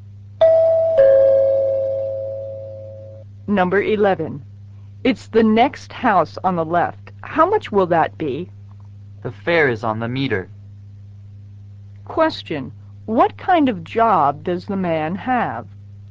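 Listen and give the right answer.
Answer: He is a taxi driver.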